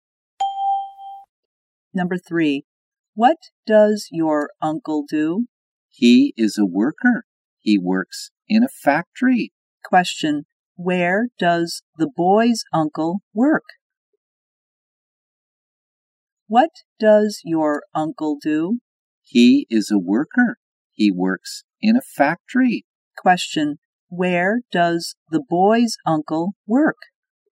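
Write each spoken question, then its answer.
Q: Where does the boy's uncle work?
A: In a factory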